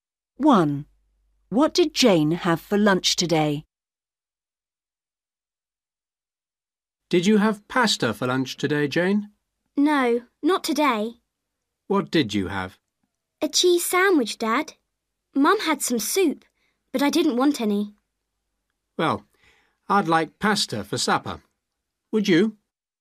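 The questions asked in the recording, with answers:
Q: What did Jane have for lunch today?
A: A cheese sandwich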